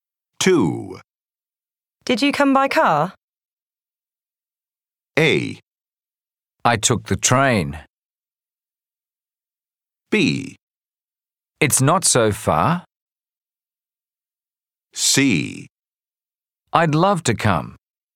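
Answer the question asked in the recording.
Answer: A: I took the train.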